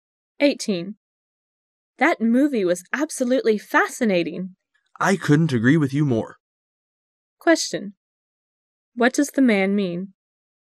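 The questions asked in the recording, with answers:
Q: What does the man mean?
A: He also found the movie fascinating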